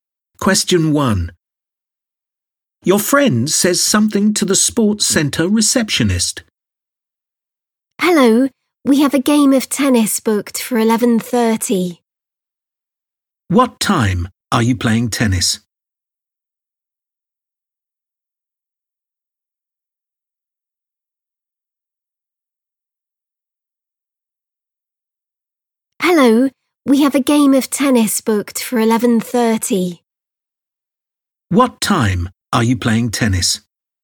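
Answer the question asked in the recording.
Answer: 11:30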